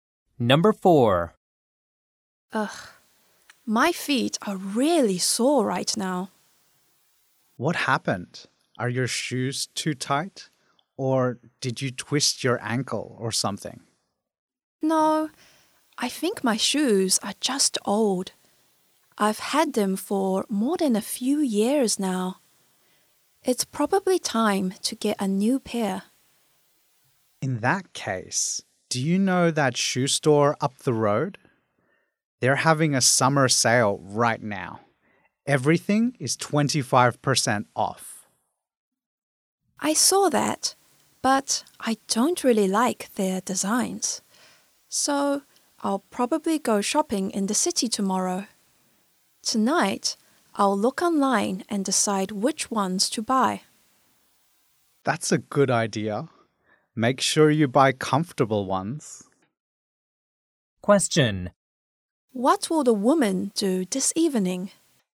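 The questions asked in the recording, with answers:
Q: What will the woman do this evening?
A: Look online and decide which shoes to buy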